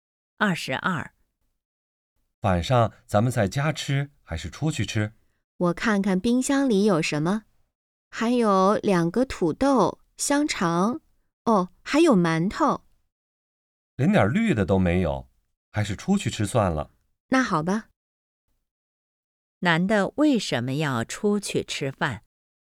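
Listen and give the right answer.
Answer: 家里没有蔬菜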